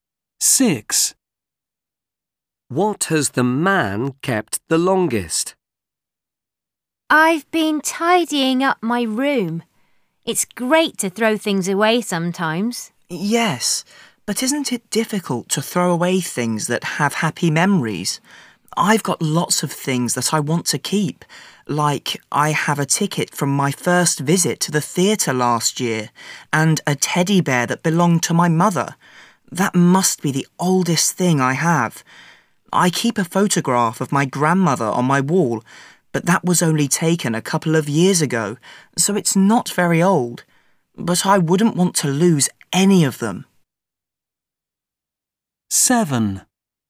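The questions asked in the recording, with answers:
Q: What has the man kept the longest?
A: A teddy bear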